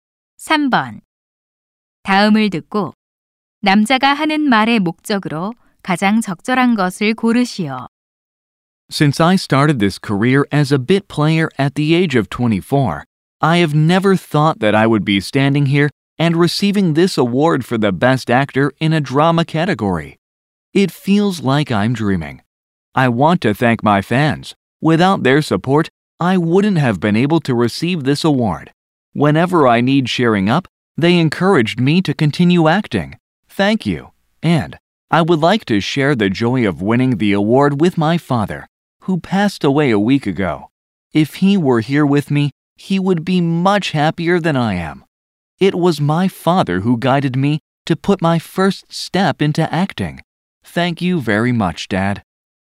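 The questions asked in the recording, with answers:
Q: 다음을 듣고 남자가 하는 말의 목적으로 가장 적절한 것을 고르시오.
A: 최우수 연기상 수상 소감을 말하며 팬과 아버지에게 감사하려고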